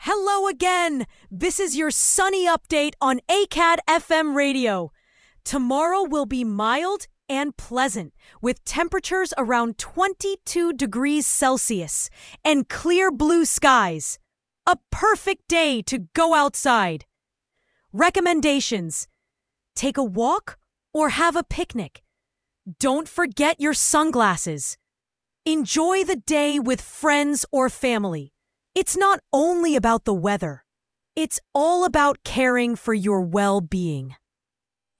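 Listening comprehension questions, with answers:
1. Hello again, this is your __________ update on ACAD FM Radio!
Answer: sunny

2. Tomorrow will be mild and pleasant, with temperatures around 22 __________ Celsius and clear blue skies.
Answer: degrees

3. – Don't forget your __________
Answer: sunglasses

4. It's not only about the weather, it's all about __________ for your well-being.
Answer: caring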